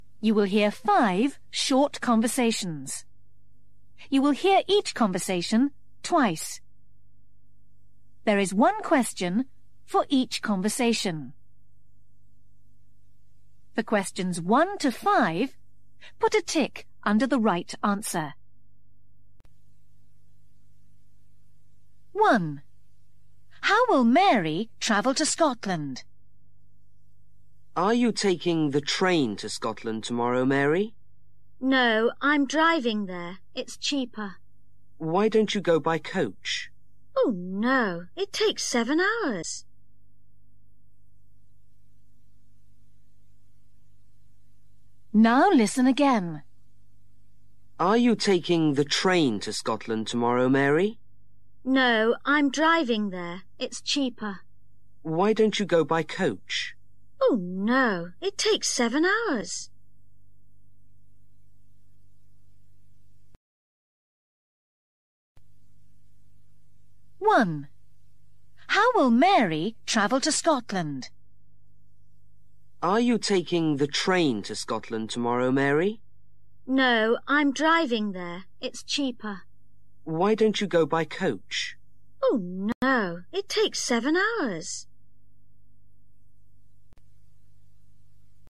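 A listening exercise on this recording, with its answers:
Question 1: How will Mary travel to Scotland?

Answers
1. By car (driving)

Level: KELAS 6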